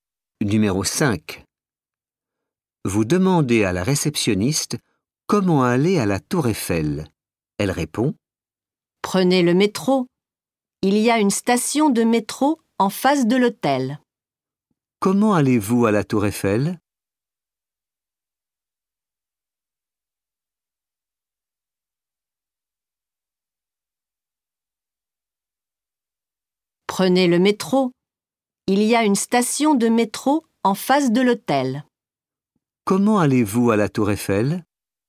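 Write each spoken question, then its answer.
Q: Comment allez-vous à la Tour Eiffel?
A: en métro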